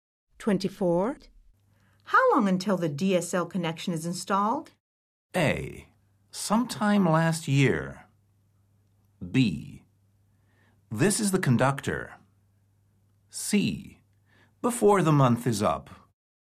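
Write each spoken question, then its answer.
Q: How long until the DSL connection is installed?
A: C: Before the month is up.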